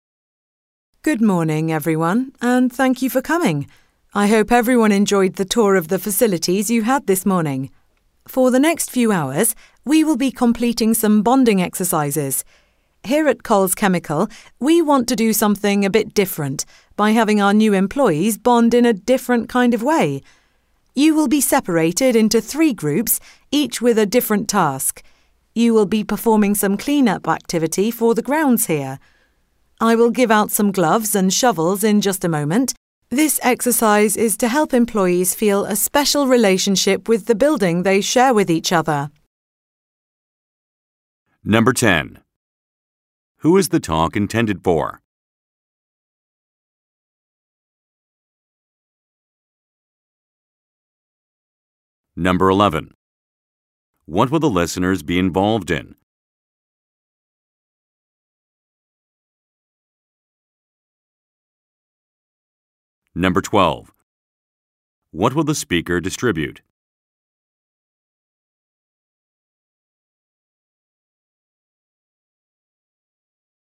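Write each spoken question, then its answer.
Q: Who is the talk intended for?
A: New employees

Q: What will the listeners be involved in?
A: A clean-up activity of the grounds (bonding exercises)

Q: What will the speaker distribute?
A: Gloves and shovels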